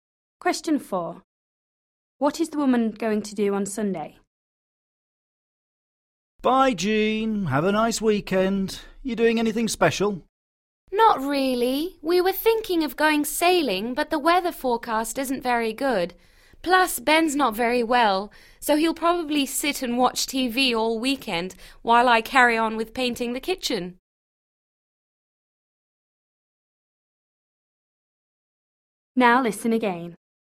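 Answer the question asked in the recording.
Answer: paint the kitchen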